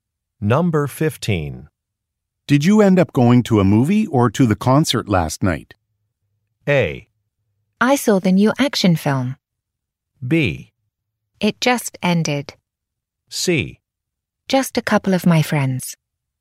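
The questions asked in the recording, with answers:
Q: Did you end up going to a movie or to the concert last night?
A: A: I saw the new action film.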